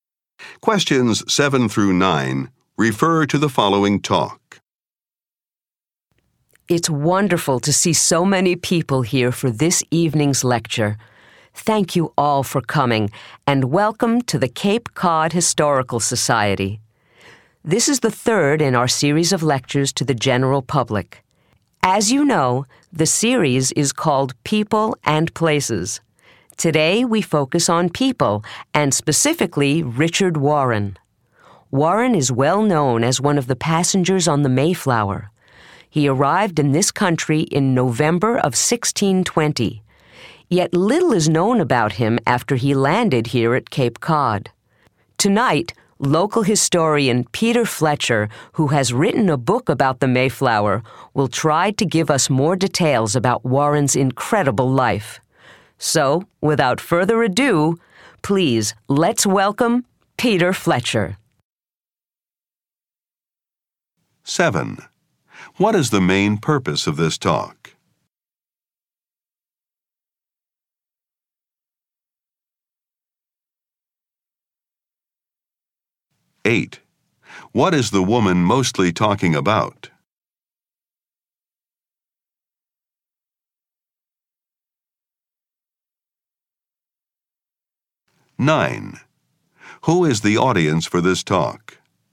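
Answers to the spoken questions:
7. To introduce a guest lecturer, Peter Fletcher
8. Tonight's lecture on Richard Warren
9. Members of the general public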